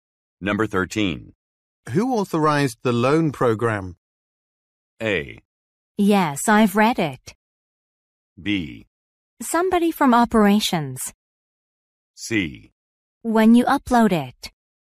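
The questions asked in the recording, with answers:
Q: Who authorized the loan program?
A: B: Somebody from operations.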